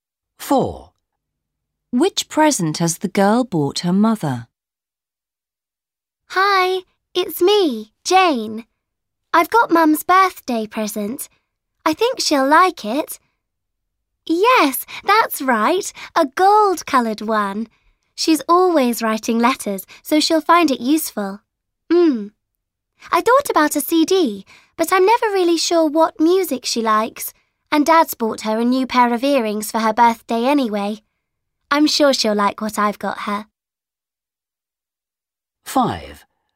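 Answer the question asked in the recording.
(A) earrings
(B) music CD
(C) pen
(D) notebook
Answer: (C) pen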